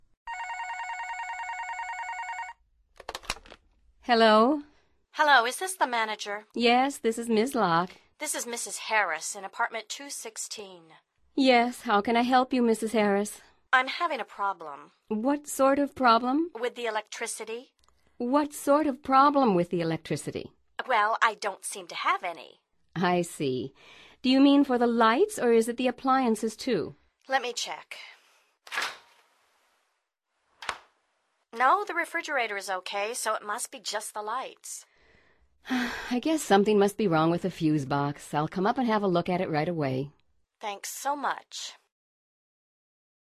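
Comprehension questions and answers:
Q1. What is Mrs. Harris' problem?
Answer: No electricity for the lights.

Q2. Who is going to help Mrs. Harris?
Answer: The manager herself.

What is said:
Hello?
Mrs. Harris:
Hello. Is this the manager?
Yes, this is Ms. Lock.
Mrs. Harris:
This is Mrs. Harris in Apartment 216.
Yes. How can I help you, Mrs. Harris?
Mrs. Harris:
I'm having a problem.
What sort of problem?
Mrs. Harris:
With the electricity.
What sort of problem with the electricity?
Mrs. Harris:
Well, I don't seem to have any.
I see. Do you mean for the lights or is it the appliances, too?
Mrs. Harris:
Let me check ... [refrigerator door opens] No, the refrigerator is OK, so it must be just the lights.
I guess something must be wrong with the fuse box. I'll come up and have a look at it right away.
Mrs. Harris:
Thanks so much.

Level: Nivel Avanzado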